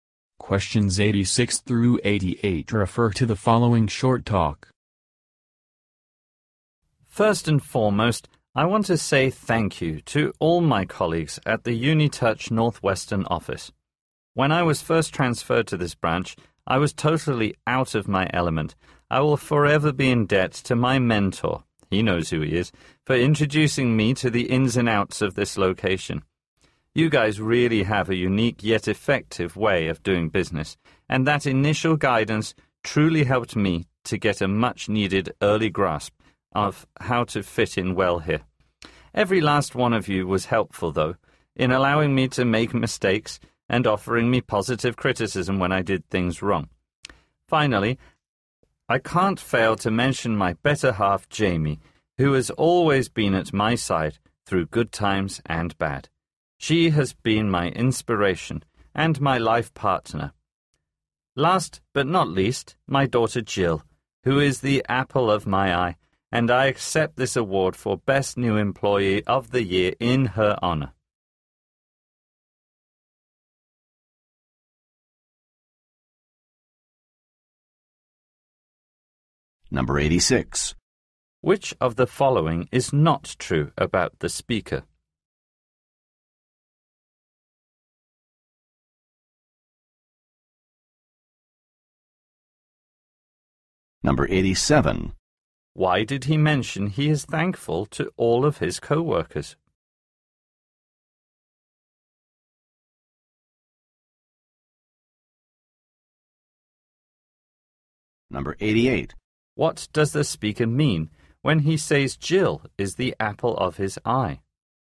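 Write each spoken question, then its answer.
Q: Why did he mention he is thankful to all of his co-workers?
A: They let him make mistakes and gave him positive criticism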